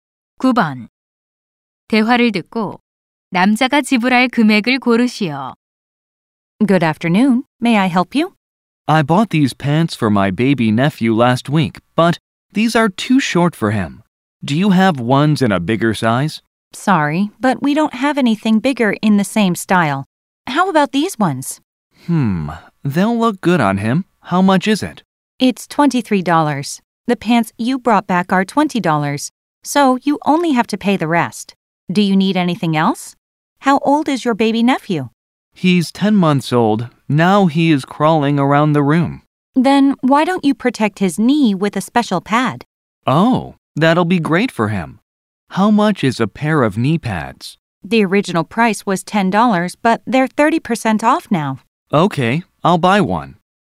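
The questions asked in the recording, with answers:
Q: 대화를 듣고 남자가 지불할 금액을 고르시오.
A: $10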